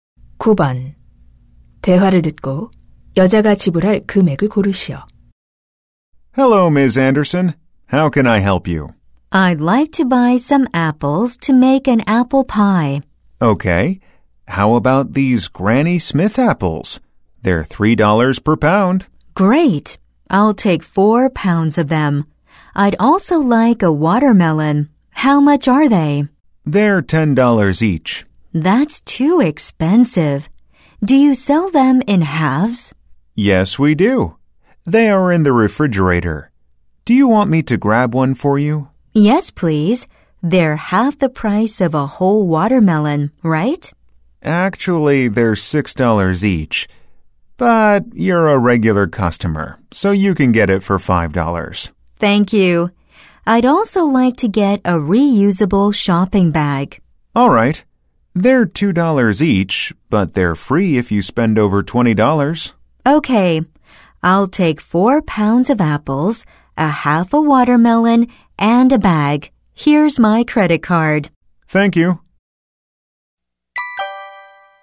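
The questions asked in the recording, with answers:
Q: 대화를 듣고 여자가 지불할 금액을 고르시오.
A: $19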